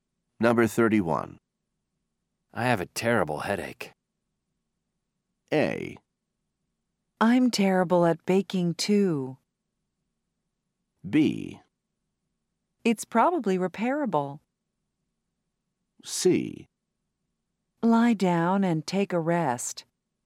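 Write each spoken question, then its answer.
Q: I have a terrible headache.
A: C: Lie down and take a rest.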